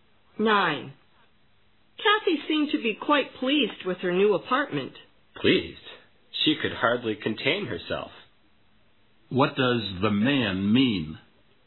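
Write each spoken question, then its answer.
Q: What does the man mean?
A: Kathy was extremely pleased.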